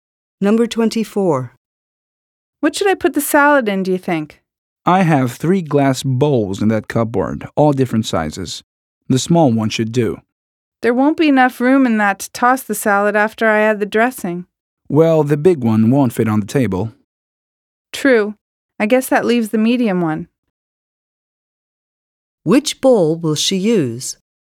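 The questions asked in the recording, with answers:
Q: Which bowl will she use?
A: The medium one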